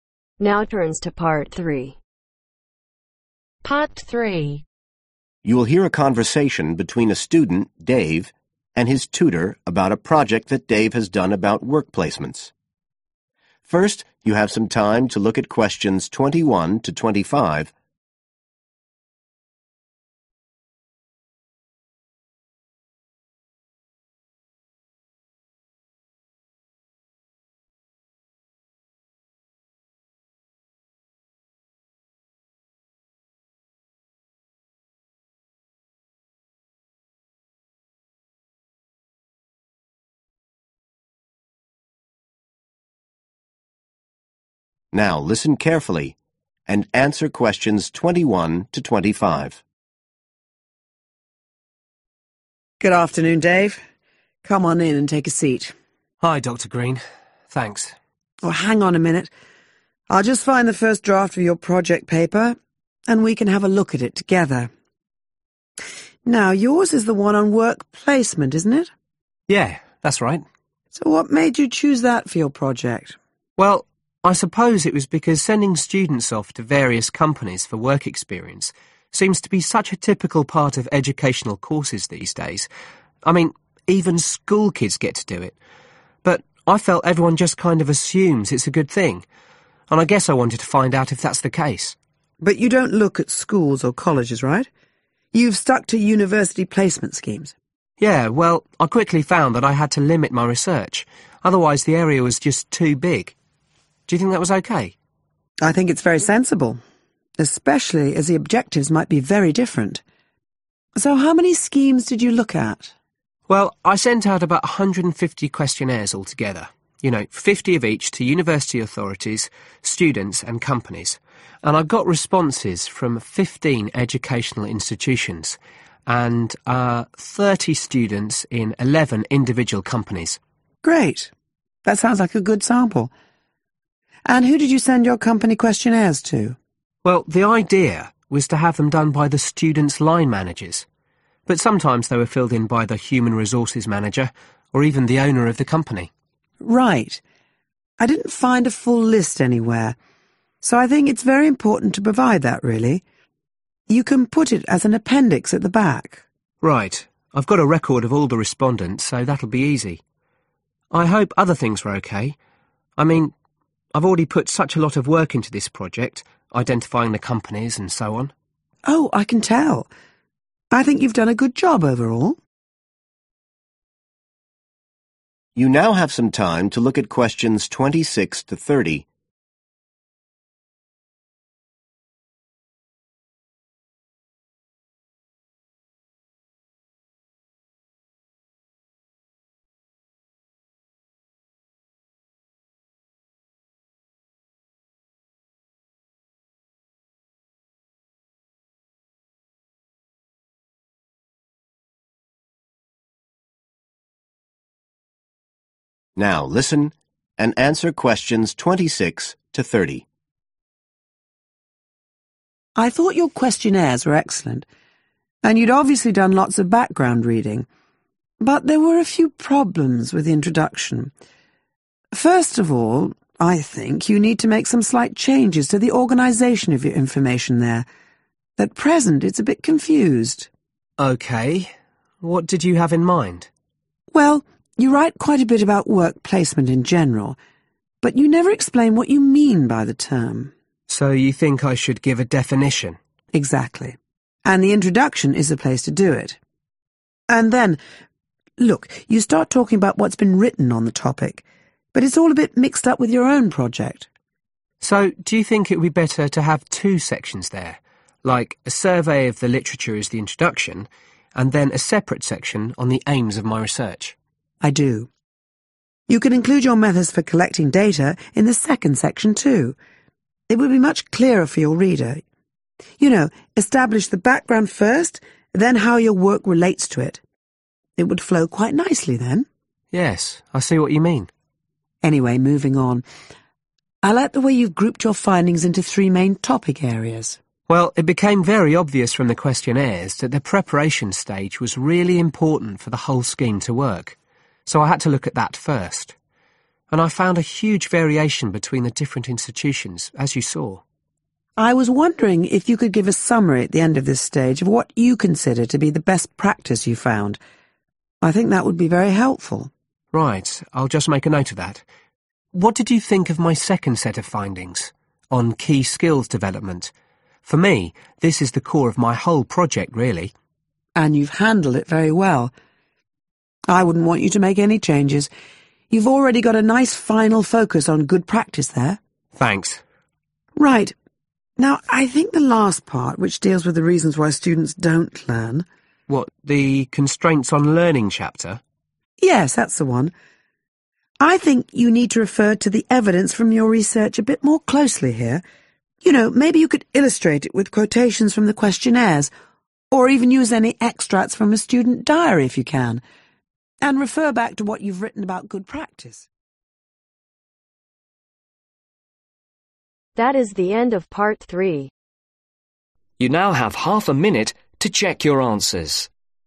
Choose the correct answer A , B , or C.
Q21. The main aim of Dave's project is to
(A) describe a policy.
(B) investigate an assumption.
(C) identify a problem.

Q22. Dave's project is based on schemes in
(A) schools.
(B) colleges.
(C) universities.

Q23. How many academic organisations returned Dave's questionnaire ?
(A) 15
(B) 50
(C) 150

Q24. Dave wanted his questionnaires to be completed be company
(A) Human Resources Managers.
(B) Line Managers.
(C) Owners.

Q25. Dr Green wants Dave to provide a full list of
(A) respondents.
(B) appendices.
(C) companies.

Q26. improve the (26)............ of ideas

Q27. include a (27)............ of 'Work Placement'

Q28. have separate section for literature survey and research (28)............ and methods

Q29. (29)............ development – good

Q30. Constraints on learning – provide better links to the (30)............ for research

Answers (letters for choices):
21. B
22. C
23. A
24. B
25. A
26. Organisation
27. Definition
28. Aims
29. Key Skills
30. Evidence